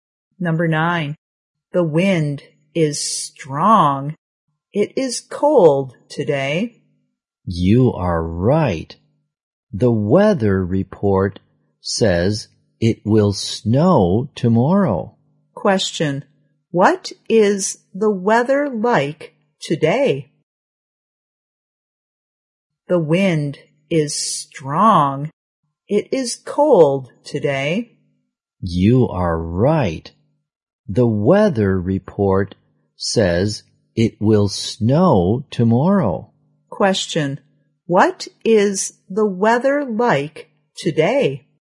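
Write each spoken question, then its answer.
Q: Question. What is the weather like today?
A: Windy and cold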